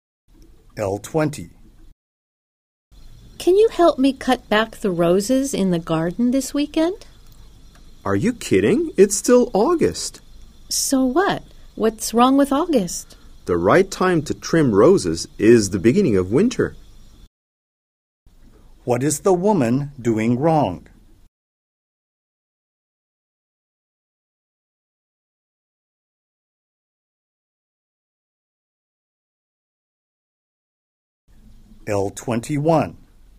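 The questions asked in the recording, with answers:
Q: What is the woman doing wrong?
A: Trimming the roses at the wrong time (in August instead of early winter)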